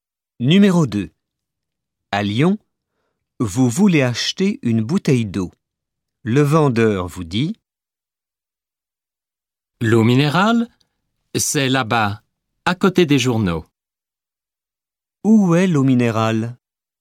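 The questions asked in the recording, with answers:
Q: « Où est l'eau minérale ?»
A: À côté des journaux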